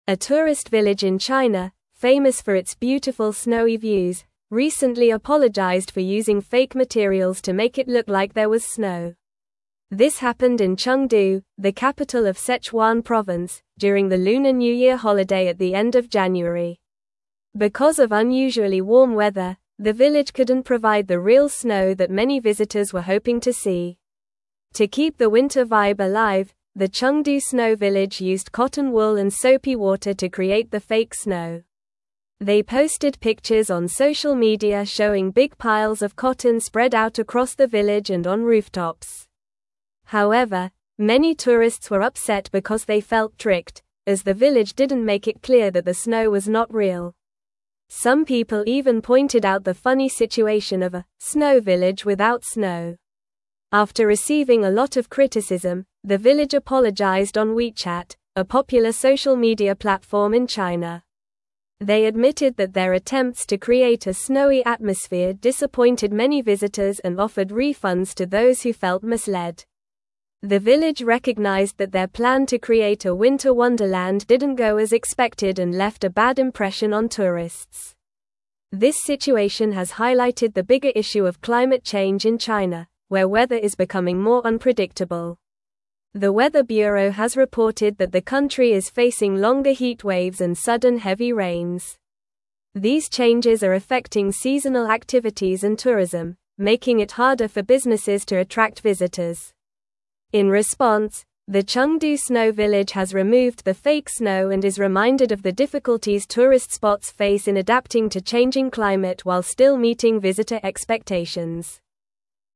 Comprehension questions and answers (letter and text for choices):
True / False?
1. They provided refunds to visitors who were satisfied with the snow.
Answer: False

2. The village used fake materials to create the appearance of snow.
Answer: True

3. Many tourists were upset because they thought the snow was real.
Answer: True

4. They used tissue paper and detergent to create the artificial snow.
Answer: False

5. The village is situated in Chongqing, the capital of Sichuan province.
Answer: False

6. The town expressed regret on Weibo after facing criticism.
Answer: False

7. A tourist village in China is known for its snowy views.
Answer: True

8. The situation highlights the impact of climate change on tourism in China.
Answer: True

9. What did the Chengdu Snow Village use to create fake snow?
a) Plastic pellets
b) Ice shavings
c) Cotton wool and soapy water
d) Paper snowflakes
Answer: c) Cotton wool and soapy water

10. Why did the village apologize to tourists?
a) They ran out of tickets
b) They used fake materials to create snow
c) They had poor customer service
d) They closed early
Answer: b) They used fake materials to create snow

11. Where is the Chengdu Snow Village located?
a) Chengdu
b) Beijing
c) Shanghai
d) Guangzhou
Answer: a) Chengdu

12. During which holiday did this incident occur?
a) Christmas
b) National Day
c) Mid-Autumn Festival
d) Lunar New Year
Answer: d) Lunar New Year

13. What did the village offer to tourists who felt misled?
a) Free meals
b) Discounted tickets for next year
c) Refunds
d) Souvenirs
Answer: c) Refunds

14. What issue does this situation highlight in China?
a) Economic growth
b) Urbanization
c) Cultural heritage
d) Climate change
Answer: d) Climate change

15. What has the weather bureau reported about the climate in China?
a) Colder winters and more snow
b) Longer heat waves and sudden heavy rains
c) Decreased rainfall and droughts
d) More predictable weather patterns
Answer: b) Longer heat waves and sudden heavy rains

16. What did the Chengdu Snow Village do after receiving criticism?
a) Removed the fake snow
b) Increased ticket prices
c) Built more attractions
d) Closed for the season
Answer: a) Removed the fake snow

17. A tourist village in (1)______, famous for its beautiful (2)______ views, recently apologized for using fake materials to make it look like there was snow.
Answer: China

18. A tourist village in (1)______, famous for its beautiful (2)______ views, recently apologized for using fake materials to make it look like there was snow.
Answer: snowy

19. This happened in (3)______, the capital of (4)______ province, during the Lunar New Year holiday at the end of January.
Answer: Chengdu

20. This happened in (3)______, the capital of (4)______ province, during the Lunar New Year holiday at the end of January.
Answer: Sichuan

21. To keep the winter vibe alive, the Chengdu Snow Village used cotton wool and soapy (5)______ to (6)______ the fake snow.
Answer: water

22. To keep the winter vibe alive, the Chengdu Snow Village used cotton wool and soapy (5)______ to (6)______ the fake snow.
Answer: create

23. They posted pictures on social media showing big piles of cotton spread out across the (7)______ and on rooftops.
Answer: village

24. However, many (8)______ were upset because they felt tricked, as the village didn't make it clear that the snow was not real.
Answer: tourists

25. After receiving a lot of criticism, the village apologized on WeChat, a popular social (9)______ platform in China.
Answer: media

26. They (10)______ that their attempts to create a snowy atmosphere disappointed many visitors and offered refunds to those who felt misled.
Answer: admitted

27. The village recognized that their plan to create a winter wonderland didn't go as (11)______ and left a bad impression on tourists.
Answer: expected

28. This situation has highlighted the bigger (12)______ of climate change in China, where weather is becoming more (13)______.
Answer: issue

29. This situation has highlighted the bigger (12)______ of climate change in China, where weather is becoming more (13)______.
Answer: unpredictable

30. The weather (14)______ has reported that the country is facing longer heat waves and sudden heavy rains.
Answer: bureau

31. In response, the Chengdu Snow Village has (15)______ the fake snow and is reminded of the difficulties tourist spots face in adapting to changing climate while still (16)______ visitor expectations.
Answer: removed

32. In response, the Chengdu Snow Village has (15)______ the fake snow and is reminded of the difficulties tourist spots face in adapting to changing climate while still (16)______ visitor expectations.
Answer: meeting

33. What materials did the Chengdu Snow Village use to create the fake snow?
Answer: They used cotton wool and soapy water to create the fake snow.

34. Why did the village feel the need to create fake snow for visitors?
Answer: The village wanted to provide a winter vibe because they couldn't produce real snow due to unusually warm weather during the Lunar New Year holiday.

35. How did tourists react to the discovery that the snow was not real?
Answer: Many tourists were upset and felt tricked because the village didn't clearly indicate that the snow was fake.

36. What social media platform did the village use to apologize to visitors?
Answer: The village used WeChat to apologize to visitors.

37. What did the village offer to those who felt misled by the fake snow?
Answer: The village offered refunds to those who felt misled by the fake snow.

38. How has climate change affected the weather in China, according to the article?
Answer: Climate change has led to longer heat waves and sudden heavy rains, making the weather more unpredictable in China.

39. What challenges do tourist spots face due to changing weather conditions?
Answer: Tourist spots face challenges in attracting visitors because changing weather conditions affect seasonal activities and their ability to meet visitor expectations.

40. Why is the situation at the Chengdu Snow Village considered a reflection of a larger issue?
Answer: The situation highlights the broader issue of climate change and its impact on tourism and seasonal activities in China, showing how businesses struggle to adapt to these changes.

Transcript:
A tourist village in China, famous for its beautiful snowy views, recently apologized for using fake materials to make it look like there was snow. This happened in Chengdu, the capital of Sichuan province, during the Lunar New Year holiday at the end of January. Because of unusually warm weather, the village couldn't provide the real snow that many visitors were hoping to see.
To keep the winter vibe alive, the Chengdu Snow Village used cotton wool and soapy water to create the fake snow. They posted pictures on social media showing big piles of cotton spread out across the village and on rooftops. However, many tourists were upset because they felt tricked, as the village didn't make it clear that the snow was not real. Some people even pointed out the funny situation of a "snow village without snow."
After receiving a lot of criticism, the village apologized on WeChat, a popular social media platform in China. They admitted that their attempts to create a snowy atmosphere disappointed many visitors and offered refunds to those who felt misled. The village recognized that their plan to create a winter wonderland didn't go as expected and left a bad impression on tourists.
This situation has highlighted the bigger issue of climate change in China, where weather is becoming more unpredictable. The weather bureau has reported that the country is facing longer heat waves and sudden heavy rains. These changes are affecting seasonal activities and tourism, making it harder for businesses to attract visitors. In response, the Chengdu Snow Village has removed the fake snow and is reminded of the difficulties tourist spots face in adapting to changing climate while still meeting visitor expectations.

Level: Level 3